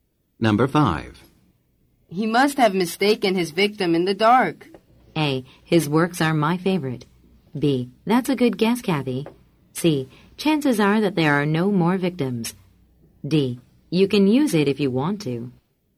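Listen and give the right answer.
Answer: B: That's a good guess, Kathy.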